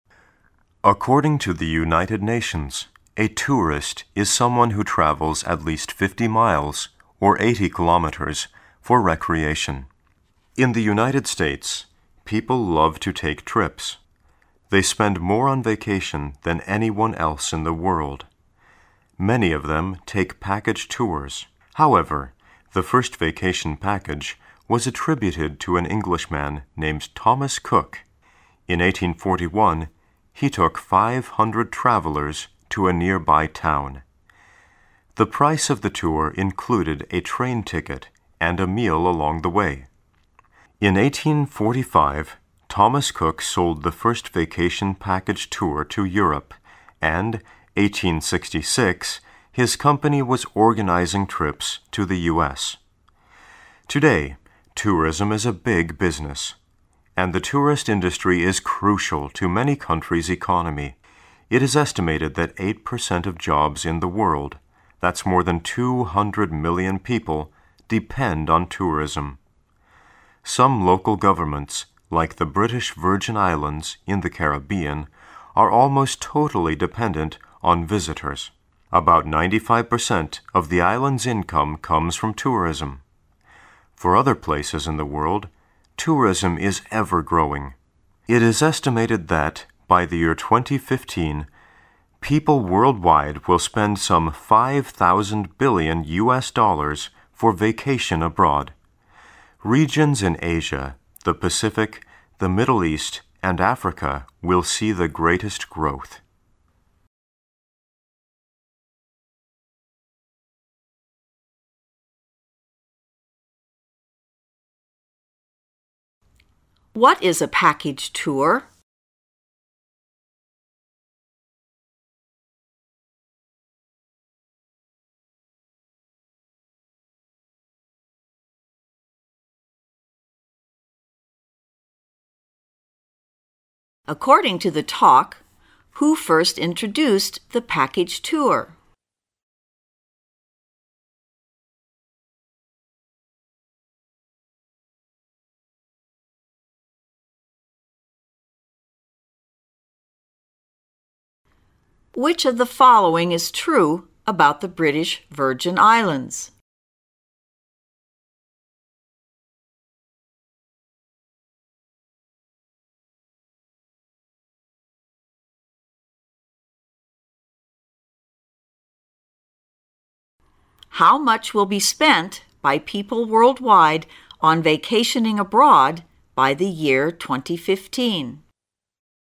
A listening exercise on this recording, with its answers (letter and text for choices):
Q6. According to the talk, who first introduced the package tour?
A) An American.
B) An Englishman.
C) An Asian official.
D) A travel agent in the Caribbean.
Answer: B) An Englishman.

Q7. Which of the following is TRUE about the British Virgin Islands?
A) It has a population of two million people.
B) Its tourist industry accounts for 8% of its GDP.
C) Most of its residents are of British origin.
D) Most of its income comes from tourism.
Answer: D) Most of its income comes from tourism.

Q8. How much will be spent by people worldwide on vacationing abroad by the year 2015?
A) Some US $50 million.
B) About US $500 million.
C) Some US $500 billion.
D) About US $5000 billion.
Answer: D) About US $5000 billion.

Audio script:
A
[解析] 15-18 According to the United Nations, a tourist is someone who travels at least 50 miles, or 80 kilometers, for recreation. In the United States, people love to take trips. They spend more on vacation than anyone else in the world. Many of them take package tours. However, the first vacation package was attributed to an Englishman named Thomas Cook. In 1841, he took 500 travelers to a nearby town. The price of the tour included a train ticket and a meal along the way. In 1845, Thomas Cook sold the first vacation package tour to Europe, and 1866, his company was organizing trips to the US. Today, tourism is a big business. And the tourist industry is crucial to many countries' economy. It is estimated that eight percent of jobs in the world—that's more than 200 million people-depend on tourism. Some local governments, like the British Virgin Islands in the Caribbean, are almost totally dependent on visitors. About 95% of the islands' income comes from tourism. For other places in the world, tourism is ever growing. It is estimated that, by the year 2015, people worldwide will spend some US$ 5000 billion for vacation abroad. Regions in Asia, the Pacific, the Middle East and Africa will see the greatest growth. What is a package tour?